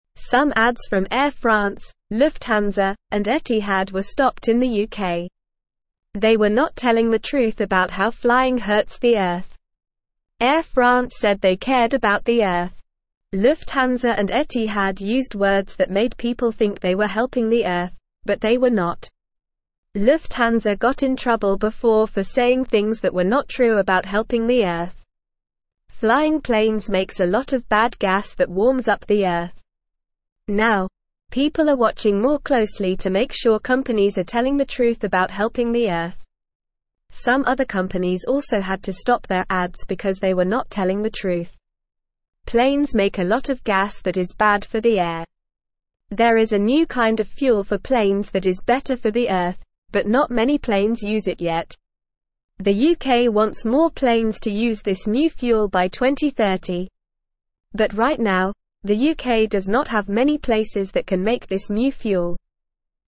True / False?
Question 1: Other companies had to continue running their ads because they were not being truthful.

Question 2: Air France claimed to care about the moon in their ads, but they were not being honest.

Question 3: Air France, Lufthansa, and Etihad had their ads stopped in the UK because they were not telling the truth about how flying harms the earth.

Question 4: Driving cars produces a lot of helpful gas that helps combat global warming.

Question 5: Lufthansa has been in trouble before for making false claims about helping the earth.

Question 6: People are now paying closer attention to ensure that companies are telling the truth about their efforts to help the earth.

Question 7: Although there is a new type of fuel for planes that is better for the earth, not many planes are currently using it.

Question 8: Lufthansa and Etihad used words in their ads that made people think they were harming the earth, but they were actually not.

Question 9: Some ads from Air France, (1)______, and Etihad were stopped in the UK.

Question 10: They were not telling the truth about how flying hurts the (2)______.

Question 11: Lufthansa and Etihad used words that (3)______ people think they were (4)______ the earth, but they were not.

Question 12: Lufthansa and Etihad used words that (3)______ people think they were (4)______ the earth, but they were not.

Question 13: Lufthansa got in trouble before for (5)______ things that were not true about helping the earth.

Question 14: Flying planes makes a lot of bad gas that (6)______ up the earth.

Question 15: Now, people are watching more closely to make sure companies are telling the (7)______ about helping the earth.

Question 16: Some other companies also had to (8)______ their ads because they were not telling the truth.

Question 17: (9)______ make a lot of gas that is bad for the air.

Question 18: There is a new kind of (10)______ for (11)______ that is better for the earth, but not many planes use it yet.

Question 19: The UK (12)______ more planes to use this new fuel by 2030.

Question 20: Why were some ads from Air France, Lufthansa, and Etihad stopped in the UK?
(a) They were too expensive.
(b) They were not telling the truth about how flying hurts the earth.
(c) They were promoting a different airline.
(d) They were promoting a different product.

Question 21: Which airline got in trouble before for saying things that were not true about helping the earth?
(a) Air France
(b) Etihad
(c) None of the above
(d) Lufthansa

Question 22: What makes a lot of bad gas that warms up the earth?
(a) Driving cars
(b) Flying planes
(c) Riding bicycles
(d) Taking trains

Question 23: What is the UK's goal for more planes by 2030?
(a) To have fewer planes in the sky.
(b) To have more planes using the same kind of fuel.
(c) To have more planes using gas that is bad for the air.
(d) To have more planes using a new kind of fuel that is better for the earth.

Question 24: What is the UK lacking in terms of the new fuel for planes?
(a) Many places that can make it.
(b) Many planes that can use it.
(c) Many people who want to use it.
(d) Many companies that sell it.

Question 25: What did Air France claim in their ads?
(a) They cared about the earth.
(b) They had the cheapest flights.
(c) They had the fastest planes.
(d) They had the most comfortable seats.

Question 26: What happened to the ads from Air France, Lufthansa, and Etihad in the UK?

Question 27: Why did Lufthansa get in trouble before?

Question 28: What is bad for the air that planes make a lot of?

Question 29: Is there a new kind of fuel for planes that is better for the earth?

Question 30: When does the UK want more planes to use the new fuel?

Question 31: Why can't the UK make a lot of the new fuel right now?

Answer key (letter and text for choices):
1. False
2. False
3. True
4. False
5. True
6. True
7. True
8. False
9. Lufthansa
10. earth
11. made
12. helping
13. saying
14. warms
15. truth
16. stop
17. Planes
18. fuel
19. wants
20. (b) They were not telling the truth about how flying hurts the earth.
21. (d) Lufthansa
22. (b) Flying planes
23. (d) To have more planes using a new kind of fuel that is better for the earth.
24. (a) Many places that can make it.
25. (a) They cared about the earth.
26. The ads were stopped in the UK because they were not telling the truth about how flying hurts the earth.
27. Lufthansa got in trouble before for saying things that were not true about helping the earth.
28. Planes make a lot of gas that is bad for the air.
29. Yes, there is a new kind of fuel for planes that is better for the earth.
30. The UK wants more planes to use the new fuel by 2030.
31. The UK does not have many places that can make this new fuel right now.

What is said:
Some ads from Air France, Lufthansa, and Etihad were stopped in the UK. Air France said they cared about the earth. Lufthansa and Etihad used words that made people think they were helping the earth, but they were not.
Lufthansa got in trouble before for saying things that were not true about helping the earth. Flying planes makes a lot of bad gas that warms up the earth. Now, people are watching more closely to make sure companies are telling the truth about helping the earth. Some other companies also had to stop their ads because they were not telling the truth.
Planes make a lot of gas that is bad for the air. There is a new kind of fuel for planes that is better for the earth, but not many planes use it yet. The UK wants more planes to use this new fuel by 2030. But right now, the UK does not have many places that can make this new fuel.

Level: Level 2